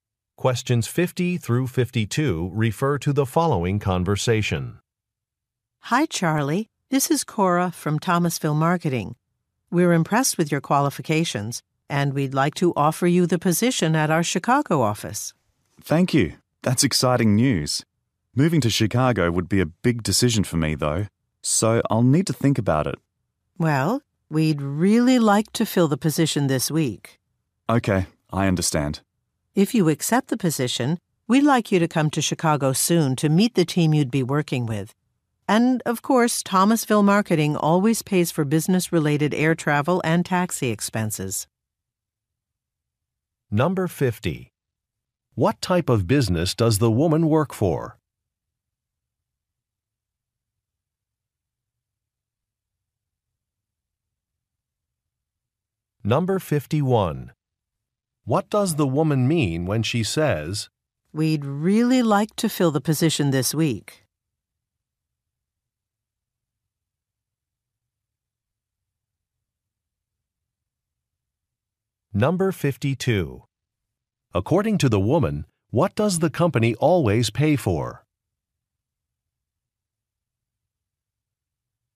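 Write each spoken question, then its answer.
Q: What type of business does the woman work for?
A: A marketing firm

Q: What does the woman mean when she says,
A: She needs a decision soon

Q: According to the woman, what does the company always pay for?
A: Business travel expenses (air travel and taxis)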